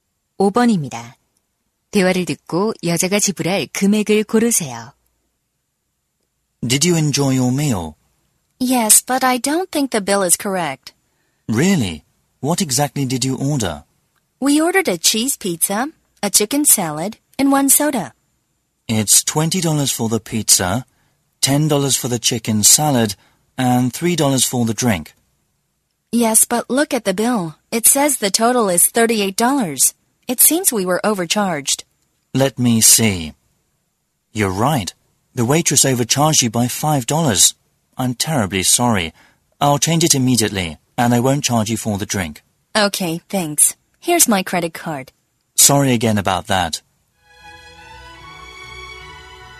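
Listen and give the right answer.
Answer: 30달러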